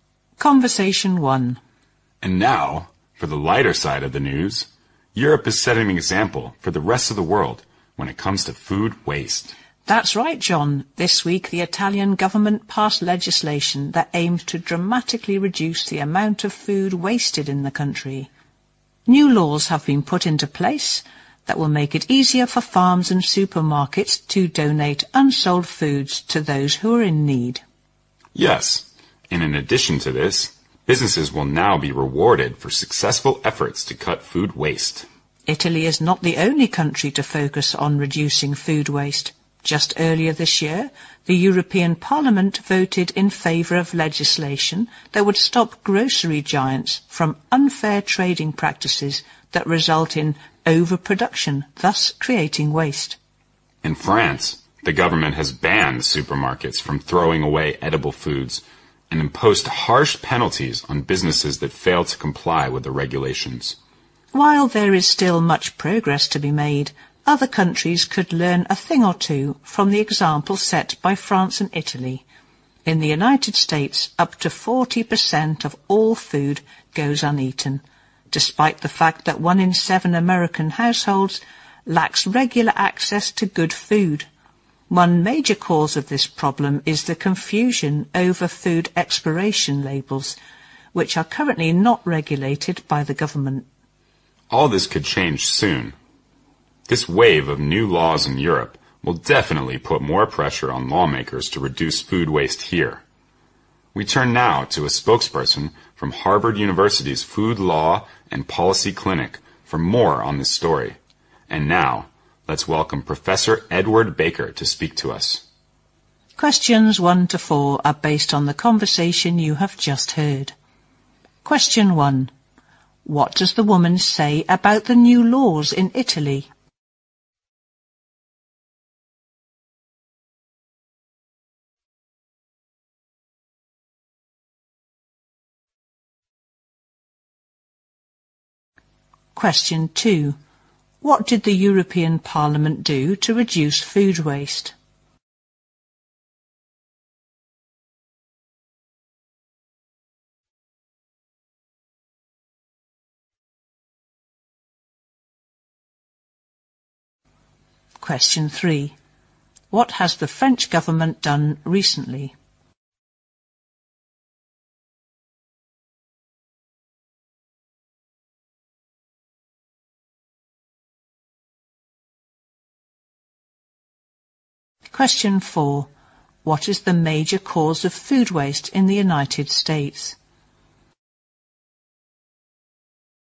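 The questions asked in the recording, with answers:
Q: What does the woman say about the new laws in Italy?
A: They make it easier for farms and supermarkets to donate unsold food to those in need.

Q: What did the European Parliament do to reduce food waste?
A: It voted for legislation to stop grocery giants' unfair trading practices that cause overproduction.

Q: What has the French government done recently?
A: It banned supermarkets from throwing away edible food.

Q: What is the major cause of food waste in the United States?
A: Confusion over food expiration labels.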